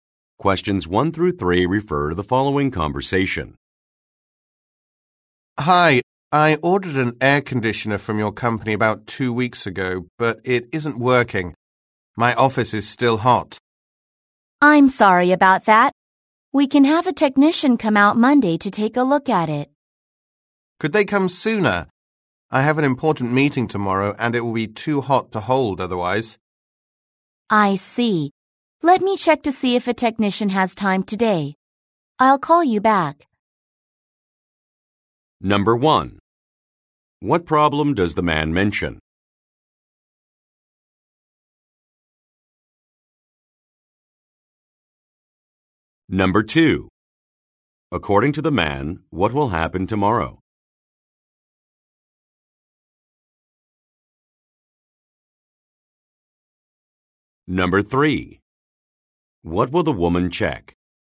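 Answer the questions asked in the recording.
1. His air conditioner isn't working.
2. He will have an important meeting.
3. Whether a technician has time today.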